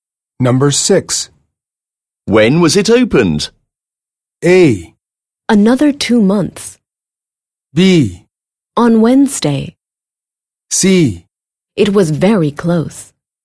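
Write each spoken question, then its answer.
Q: When was it opened?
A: B: On Wednesday.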